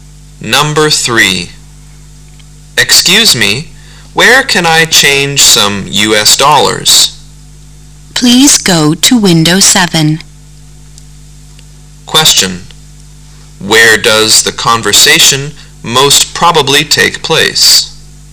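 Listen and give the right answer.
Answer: At a bank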